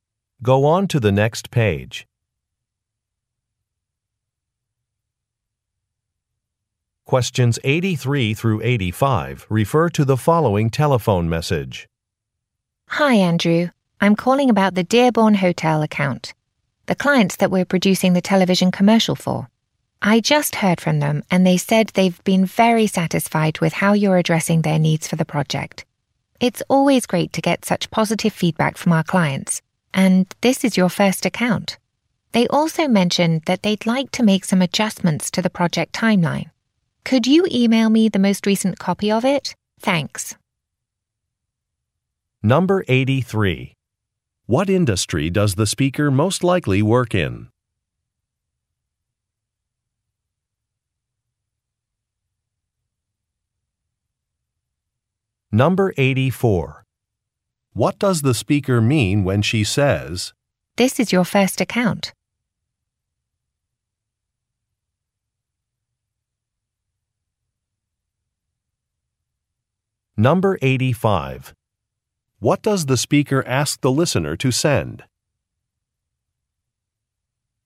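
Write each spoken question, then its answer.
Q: What industry does the speaker most likely work in?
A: Advertising

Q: What does the speaker ask the listener to send?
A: The most recent copy of the project timeline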